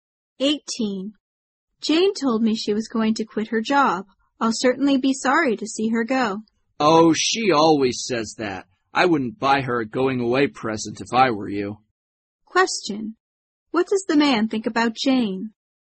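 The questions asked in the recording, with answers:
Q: What does the man think about Jane?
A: She won't really quit; she always says that.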